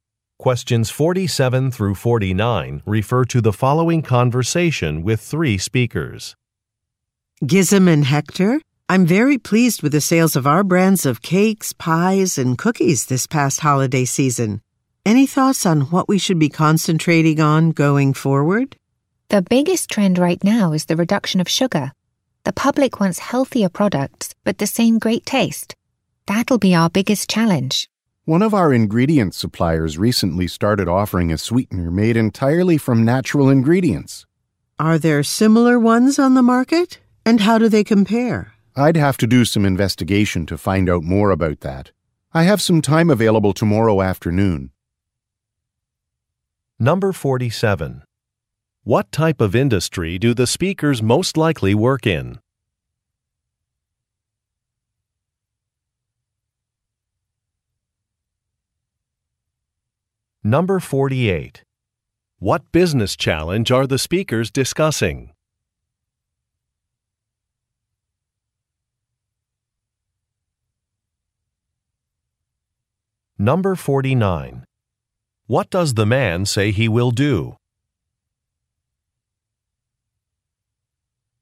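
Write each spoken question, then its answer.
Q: What type of industry do the speakers most likely work in?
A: Food (baked goods)

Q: What business challenge are the speakers discussing?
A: Reducing sugar while keeping the taste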